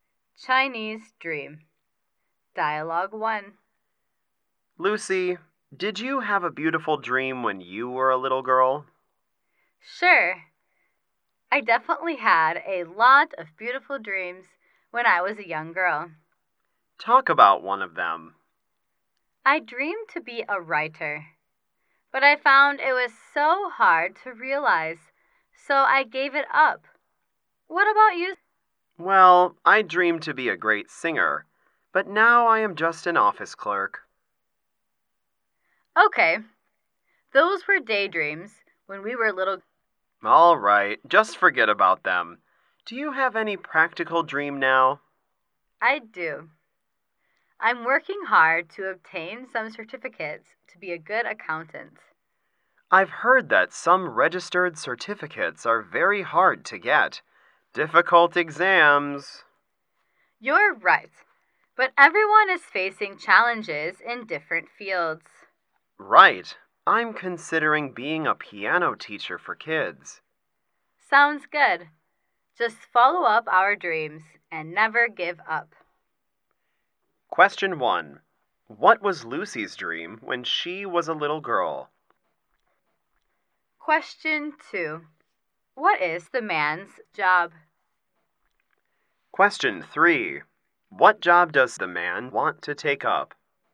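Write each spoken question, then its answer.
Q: What was Lucy's dream when she was a little girl?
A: To be a writer

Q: What is the man's job?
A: An office clerk

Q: What job does the man want to take up?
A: A piano teacher for kids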